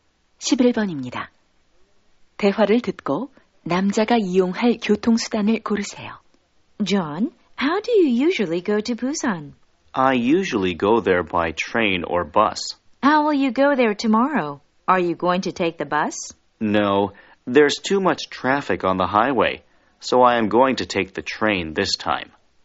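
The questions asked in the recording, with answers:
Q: 대화를 듣고 남자가 이용할 교통수단을 고르세요.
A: 기차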